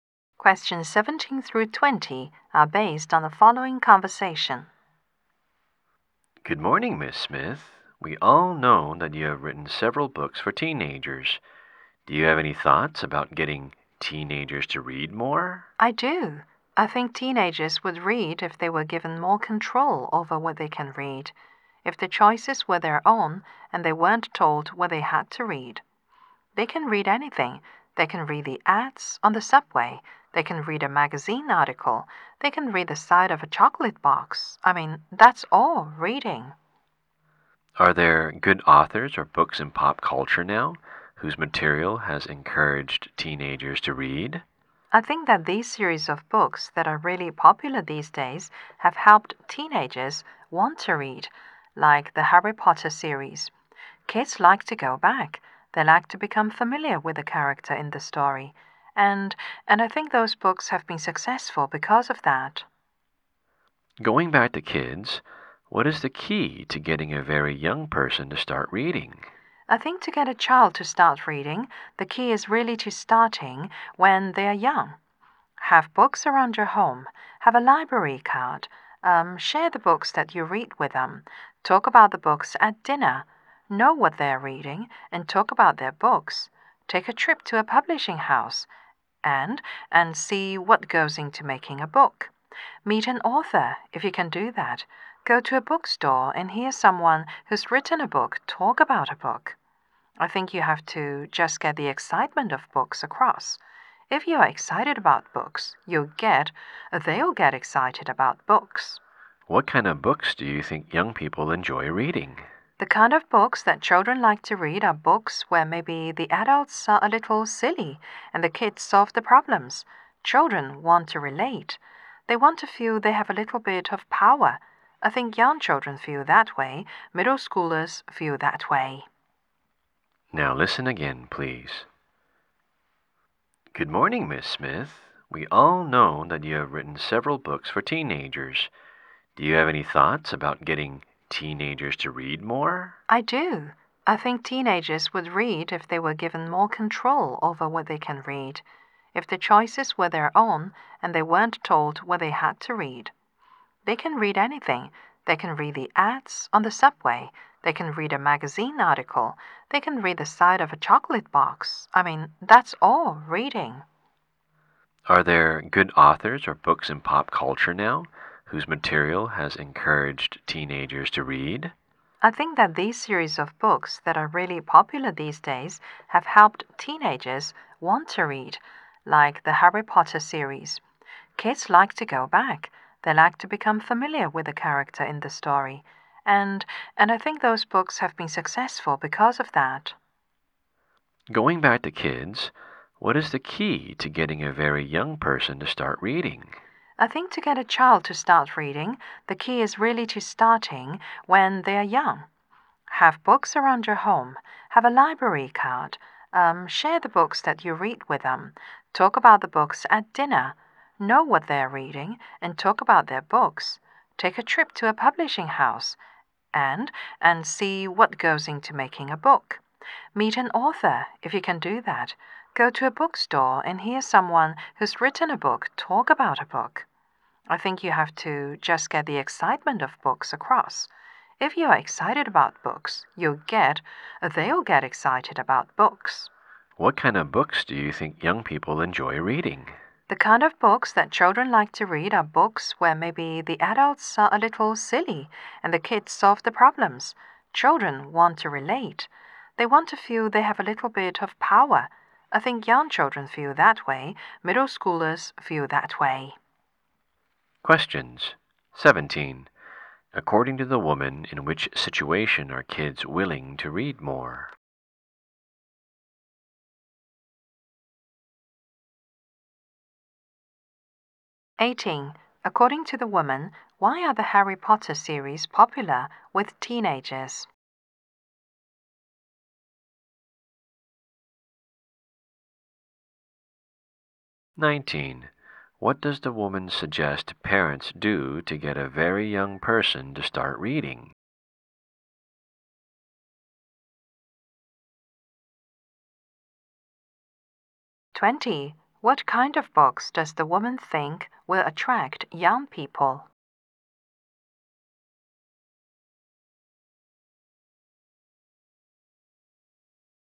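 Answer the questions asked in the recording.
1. When they can choose what to read
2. Kids like to become familiar with the characters
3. Start early: have books at home and share books with them
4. Books where the adults are silly and the kids solve the problems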